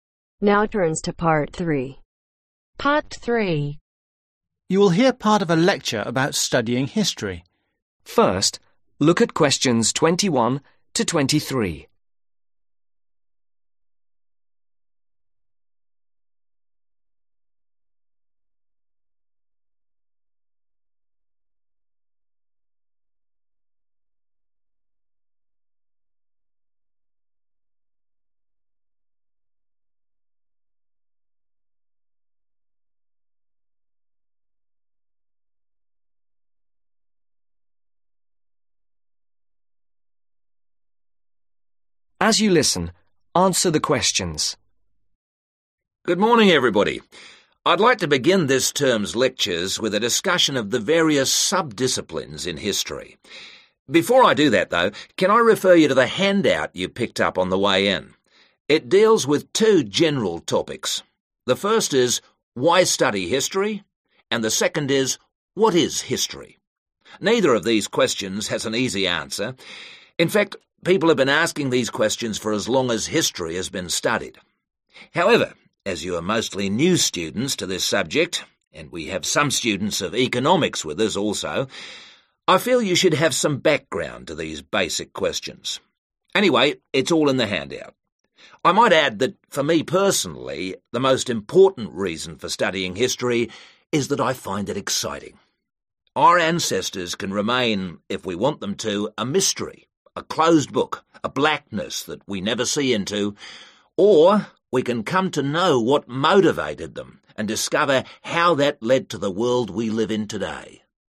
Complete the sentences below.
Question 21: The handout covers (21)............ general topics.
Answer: Two

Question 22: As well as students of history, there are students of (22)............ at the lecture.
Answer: Economics

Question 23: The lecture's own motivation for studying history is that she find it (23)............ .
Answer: Exciting